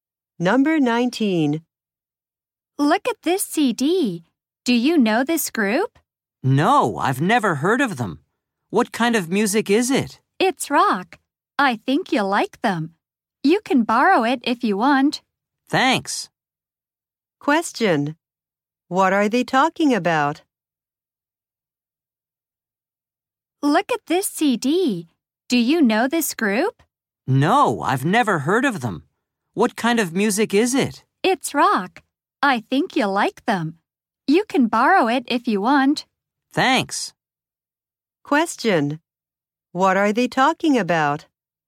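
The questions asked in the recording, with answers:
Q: What are they talking about?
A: A CD of a rock group.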